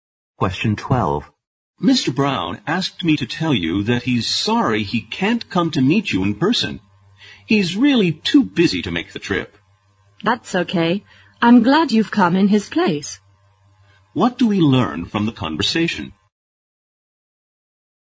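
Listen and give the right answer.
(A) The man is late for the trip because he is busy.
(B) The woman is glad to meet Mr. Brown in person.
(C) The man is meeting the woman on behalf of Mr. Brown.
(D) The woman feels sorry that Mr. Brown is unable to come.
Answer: (C) The man is meeting the woman on behalf of Mr. Brown.

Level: 四级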